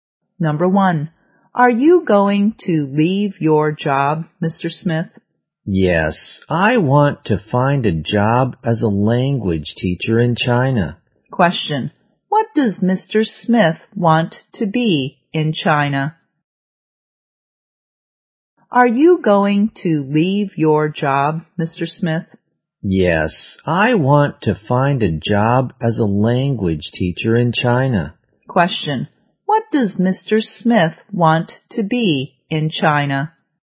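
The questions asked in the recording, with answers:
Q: What does Mr. Smith want to be in China?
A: A language teacher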